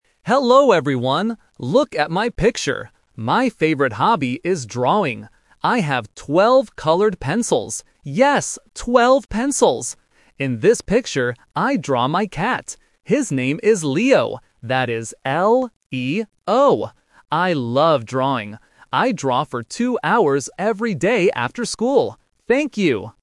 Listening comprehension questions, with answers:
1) How many colored pencils does the student have?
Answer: Twelve

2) What is the name of the cat?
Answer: Leo

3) What does the student draw in the picture?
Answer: A cat

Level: A1